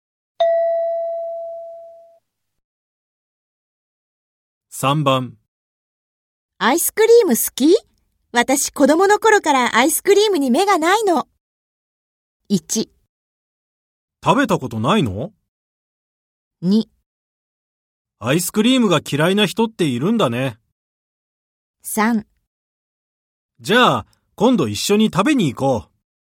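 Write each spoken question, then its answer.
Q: アイスクリーム好き?私子供の頃からアイスクリームに目がないの。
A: 3: じゃあ、今度一緒に食べに行こう。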